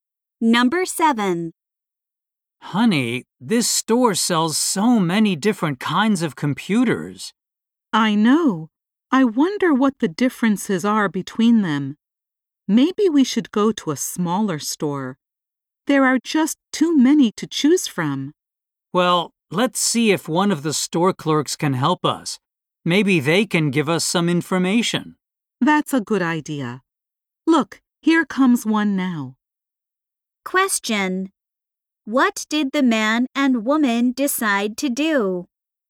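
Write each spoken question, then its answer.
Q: What did the man and woman decide to do?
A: Ask a store clerk for help.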